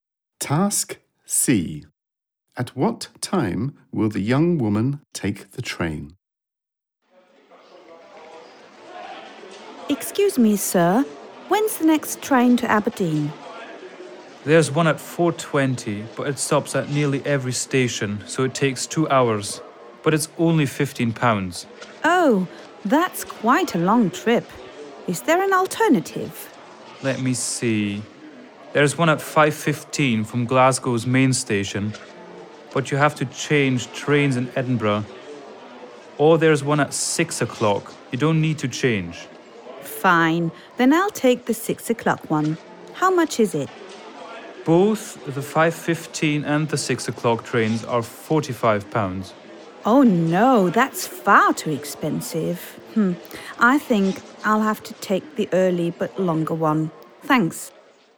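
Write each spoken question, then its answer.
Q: At what time will the young woman take the train?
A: At 4:20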